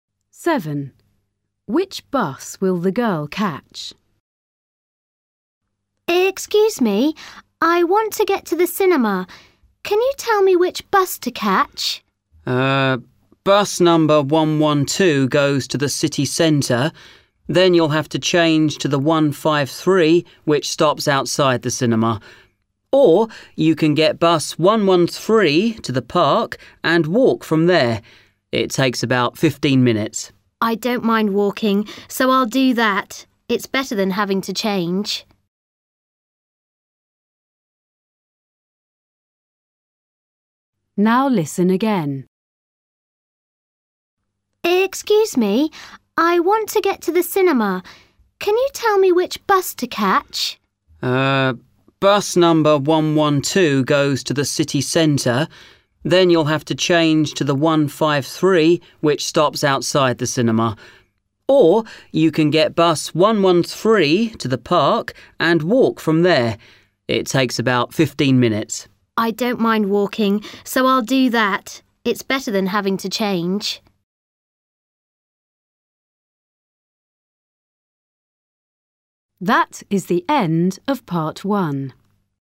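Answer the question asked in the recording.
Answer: bus 113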